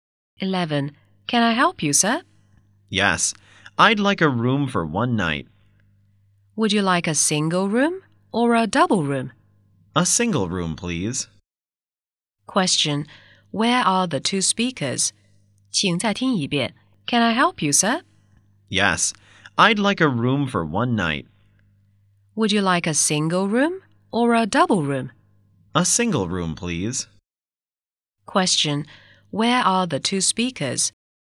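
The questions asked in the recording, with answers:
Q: where are the two speakers?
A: In a hotel.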